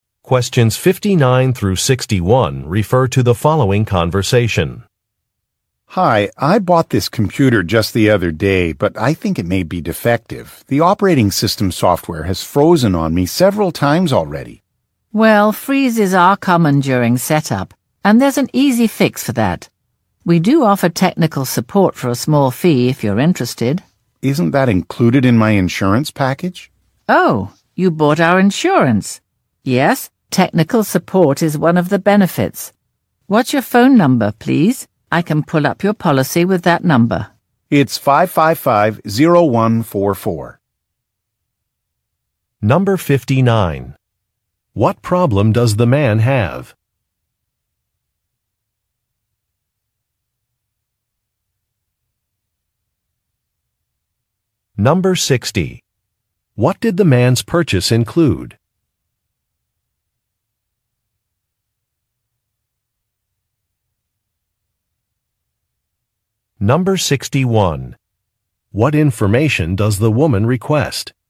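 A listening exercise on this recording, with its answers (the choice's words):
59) What problem does the man have?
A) He was overcharged for a service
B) He forgot his password.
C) His computer has not been delivered.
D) His computer is not working properly.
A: His computer is not working properly.

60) What did the man's purchase include?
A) A screen protector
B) A carrying case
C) Technical support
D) Virus protection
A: Technical support

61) What information does the woman request?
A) A phone number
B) A mailing address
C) A model number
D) A purchase date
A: A phone number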